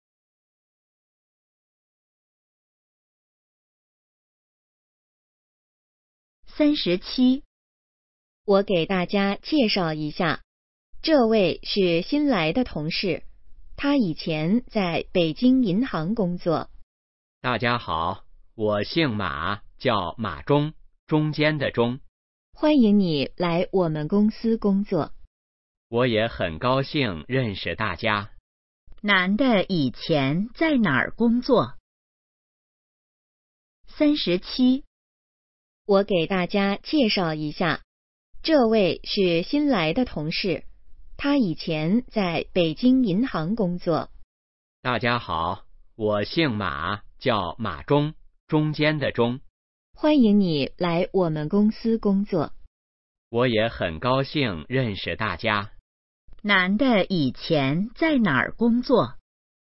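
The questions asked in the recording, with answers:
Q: 男的以前在哪儿工作?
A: 北京银行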